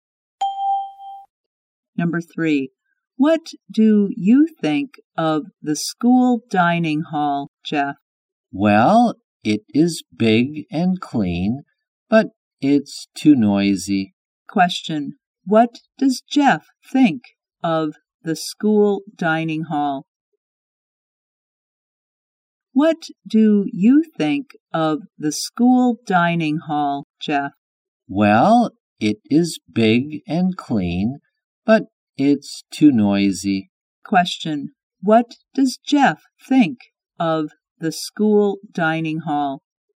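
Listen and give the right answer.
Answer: It is big and clean, but too noisy.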